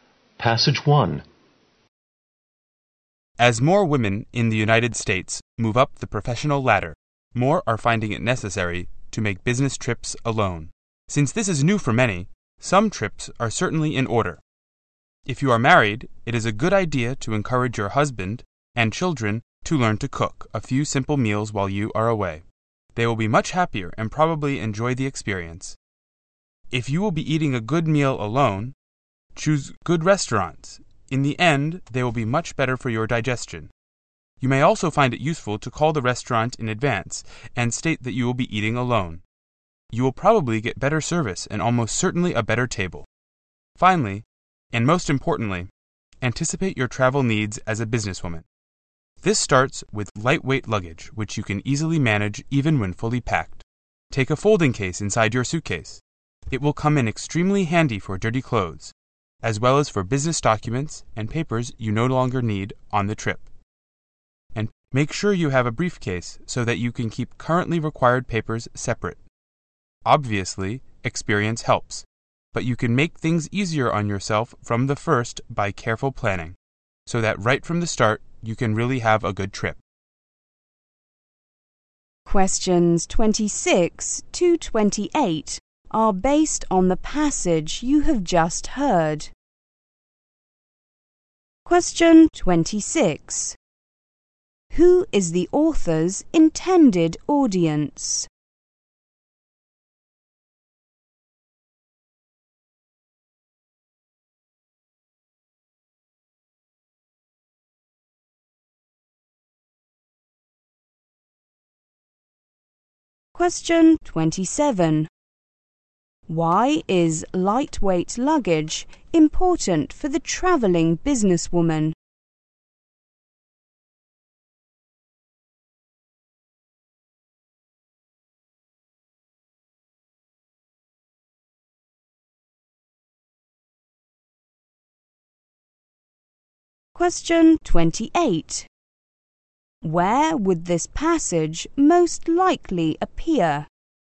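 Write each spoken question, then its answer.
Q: Who is the author's intended audience?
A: Businesswomen who travel alone

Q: Why is lightweight luggage important for the travelling businesswoman?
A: She can easily manage it even when fully packed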